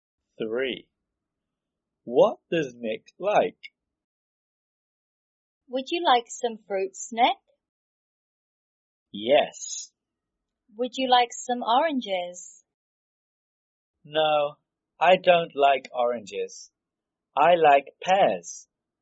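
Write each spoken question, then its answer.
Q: What does Nick like?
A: Pears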